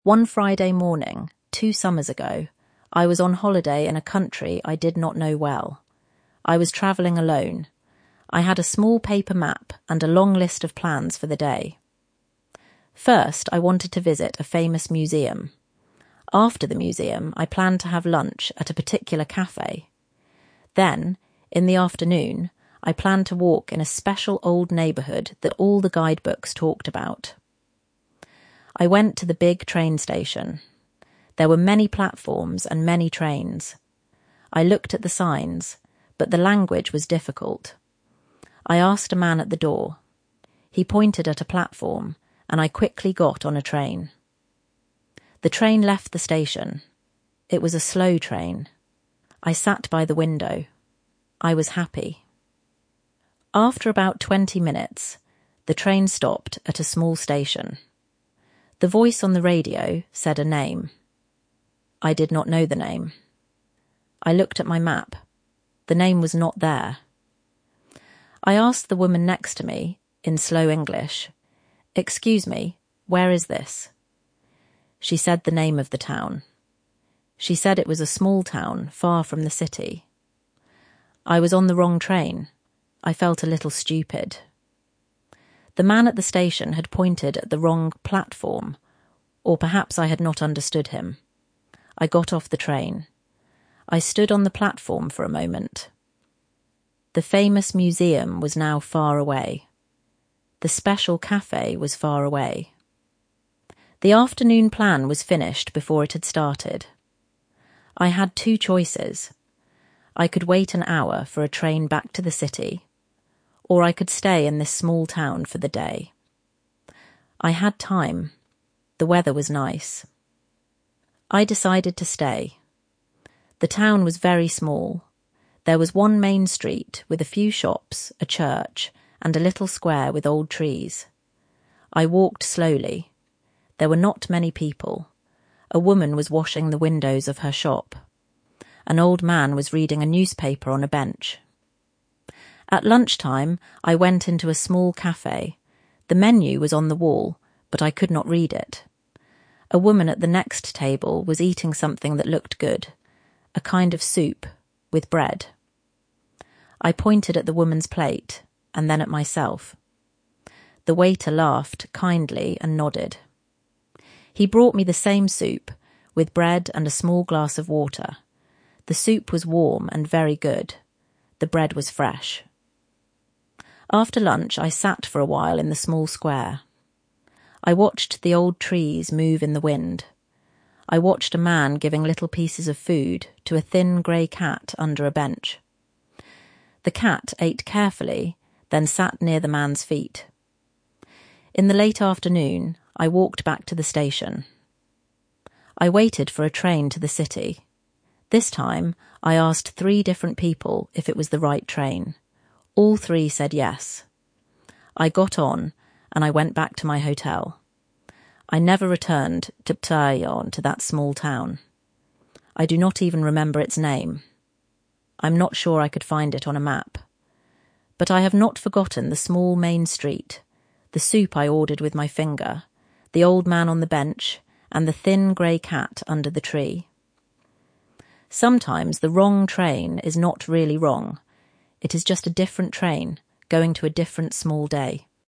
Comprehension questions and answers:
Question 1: What three things had the narrator planned for the day?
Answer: First, to visit a famous museum.

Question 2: How did the narrator end up on the wrong train?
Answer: He pointed at a platform.

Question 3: How did the narrator realise the mistake?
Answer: The name was not on the map.

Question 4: How did the narrator feel?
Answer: 'A little stupid'.

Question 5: What two choices did the narrator have?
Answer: (1) Wait an hour for a train back to the city.

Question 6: Describe the small town.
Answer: Very small.

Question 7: How did the narrator order lunch?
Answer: brought the same soup

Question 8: What did the narrator do after lunch?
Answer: They sat for a while in the small square.

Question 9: What did the narrator do differently when buying their ticket back?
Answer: asked three different people if it was the right train

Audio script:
One Friday morning, two summers ago, I was on holiday in a country I did not know well. I was travelling alone. I had a small paper map and a long list of plans for the day.
First, I wanted to visit a famous museum. After the museum, I planned to have lunch at a particular café. Then, in the afternoon, I planned to walk in a special old neighbourhood that all the guidebooks talked about.
I went to the big train station. There were many platforms and many trains. I looked at the signs, but the language was difficult. I asked a man at the door. He pointed at a platform, and I quickly got on a train.
The train left the station. It was a slow train. I sat by the window. I was happy.
After about twenty minutes, the train stopped at a small station. The voice on the radio said a name. I looked at my map. The name was not there.
I asked the woman next to me, in slow English, 'Excuse me, where is this?' She said the name of the town. She said it was a small town, far from the city.
I was on the wrong train. I felt a little stupid. The man at the station had pointed at the wrong platform, or perhaps I had not understood him.
I got off the train. I stood on the platform for a moment. The famous museum was now far away. The special café was far away. The afternoon plan was finished before it had started.
I had two choices. I could wait an hour for a train back to the city. Or I could stay in this small town for the day. I had time. The weather was nice. I decided to stay.
The town was very small. There was one main street, with a few shops, a church, and a little square with old trees. I walked slowly. There were not many people. A woman was washing the windows of her shop. An old man was reading a newspaper on a bench.
At lunchtime, I went into a small café. The menu was on the wall, but I could not read it. A woman at the next table was eating something that looked good — a kind of soup, with bread.
I pointed at the woman's plate, and then at myself. The waiter laughed kindly and nodded. He brought me the same soup, with bread and a small glass of water. The soup was warm and very good. The bread was fresh.
After lunch, I sat for a while in the small square. I watched the old trees move in the wind. I watched a man giving little pieces of food to a thin grey cat under a bench. The cat ate carefully, then sat near the man's feet.
In the late afternoon, I walked back to the station. I waited for a train to the city. This time, I asked three different people if it was the right train. All three said yes. I got on, and I went back to my hotel.
I never returned to that small town. I do not even remember its name. I am not sure I could find it on a map. But I have not forgotten the small main street, the soup I ordered with my finger, the old man on the bench, and the thin grey cat under the tree.
'The small main street, the soup I ordered with my finger, the old man on the bench, and the thin grey cat under the tree.' They do not remember the name of the town.